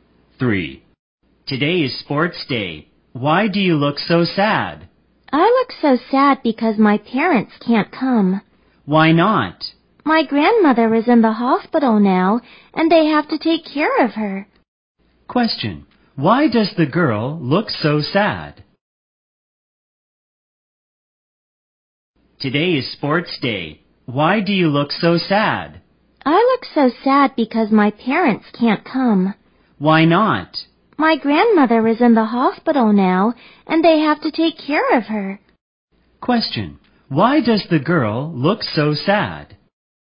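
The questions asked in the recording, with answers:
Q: Question. Why does the girl look so sad?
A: Her parents can't come to sports day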